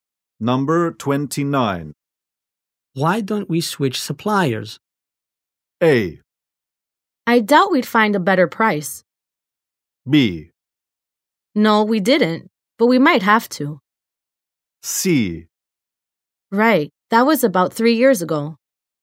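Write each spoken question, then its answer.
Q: Why don't we switch suppliers?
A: A: I doubt we'd find a better price.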